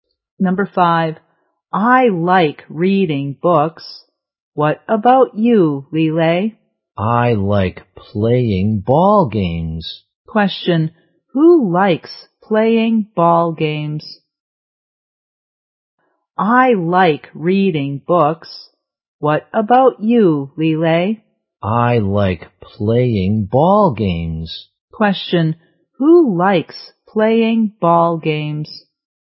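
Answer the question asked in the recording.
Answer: Lele.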